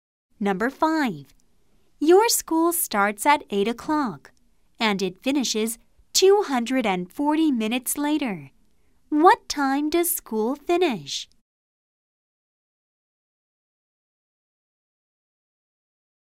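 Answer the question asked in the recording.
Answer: 12 o'clock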